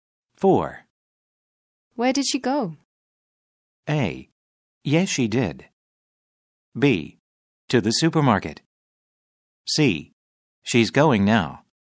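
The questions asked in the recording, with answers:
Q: Where did she go?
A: B: To the supermarket.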